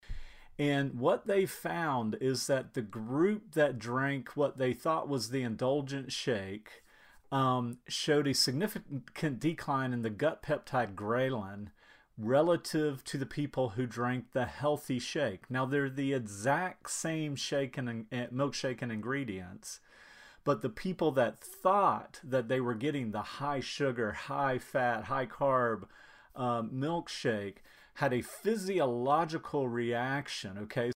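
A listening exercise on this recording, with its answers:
Listen to the audio file. Is this true?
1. The people who thought they were getting the healthy milkshake had a physiological reaction.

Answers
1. False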